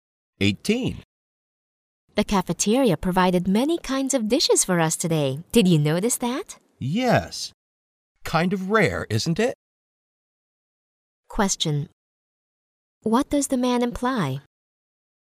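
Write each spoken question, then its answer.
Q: What does the man imply?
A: It is unusual for the cafeteria to offer so many dishes.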